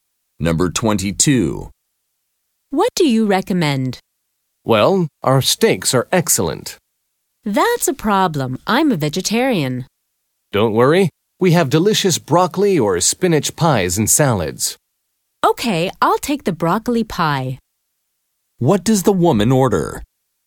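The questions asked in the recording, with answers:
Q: What does the woman order?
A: Broccoli pie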